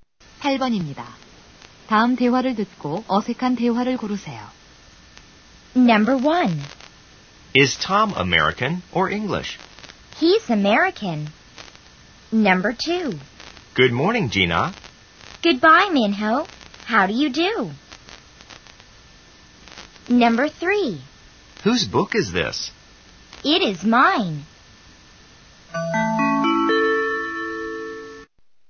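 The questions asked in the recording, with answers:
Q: 다음 대화를 듣고 어색한 대화를 고르세요.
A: 2번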